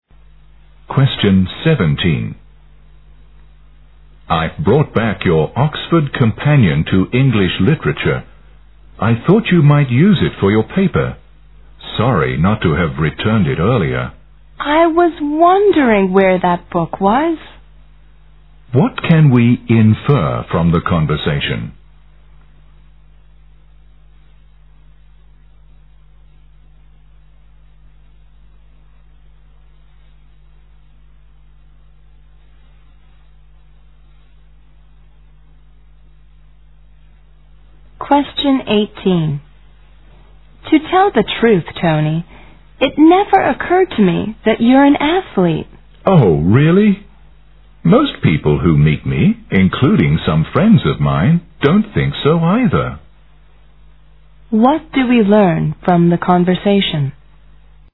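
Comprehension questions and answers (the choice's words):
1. What can we infer from that conversation?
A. The woman wondered why the man didn't return the book.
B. The woman doesn't seem to know what the book is about.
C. The woman doesn't find the book useful any more.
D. The woman forgot lending the book to the man.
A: The woman forgot lending the book to the man.

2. What do we learn from the conversation?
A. Most of the man's friends are athletes.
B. Few people share the woman's opinion.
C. The man doesn't look like a sportsman.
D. The woman doubts the man's athletic ability.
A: The man doesn't look like a sportsman.

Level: 四级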